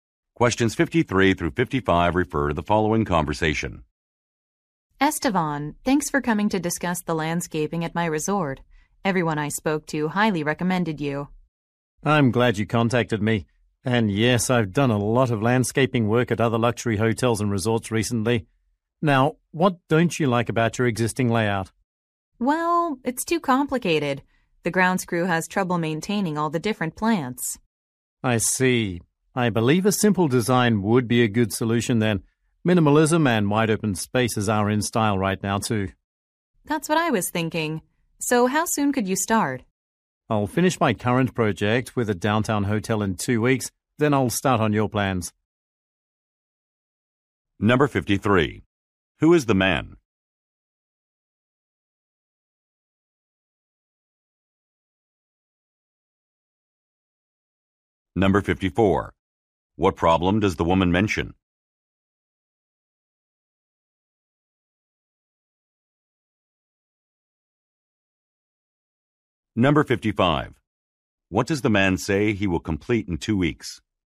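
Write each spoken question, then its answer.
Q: Who is the man?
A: A landscaper

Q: What problem does the woman mention?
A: The layout is too complicated to maintain

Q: What does the man say he will complete in 2 weeks?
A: A project for a downtown hotel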